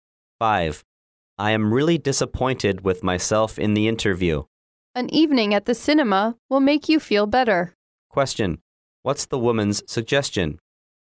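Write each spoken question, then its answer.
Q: What's the woman's suggestion?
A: Going to the cinema in the evening.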